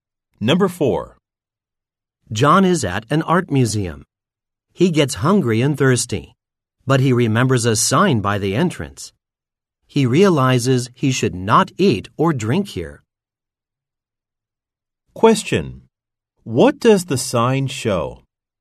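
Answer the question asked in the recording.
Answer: No eating or drinking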